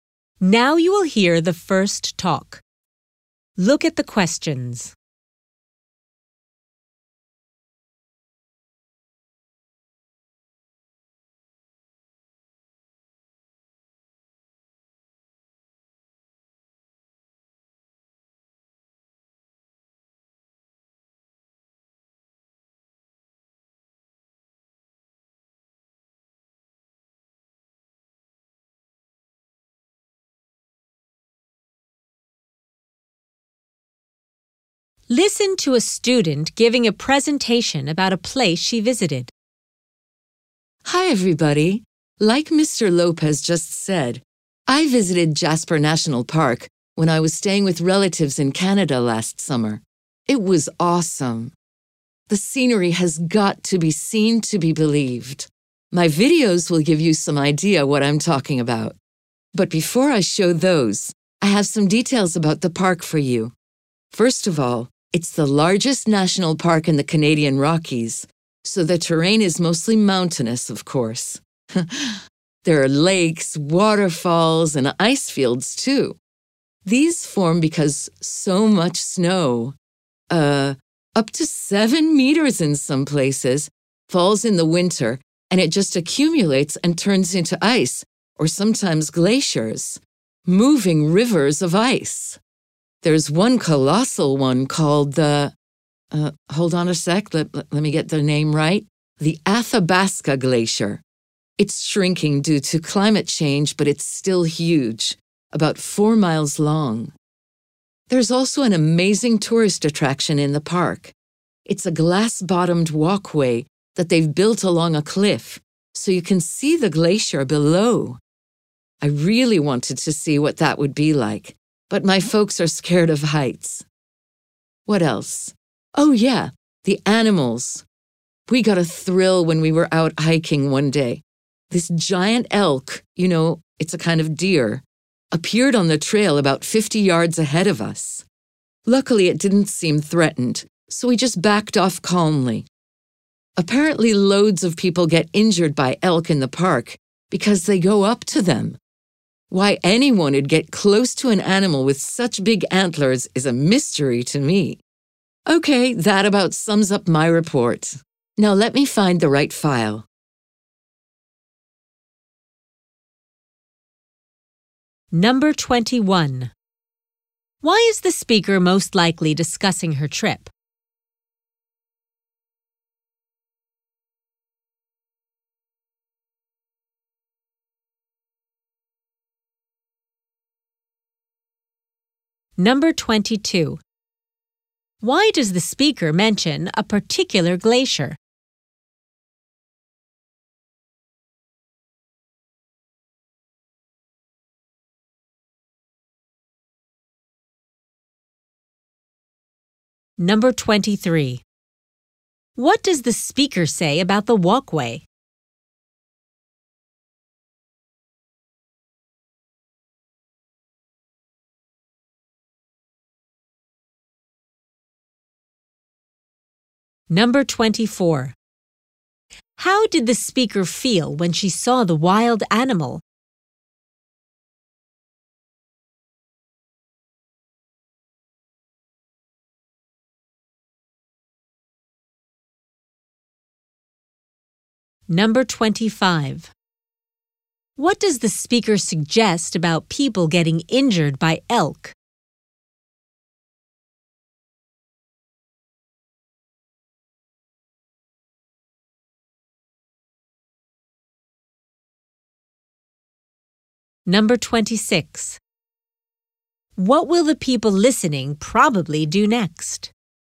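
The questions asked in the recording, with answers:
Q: What does the speaker say about the walkway?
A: She wanted to try it but didn't because her family is scared of heights

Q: What does the speaker suggest about people getting injured by elk?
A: It's their own fault for getting too close

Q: What will the people listening probably do next?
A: Watch her videos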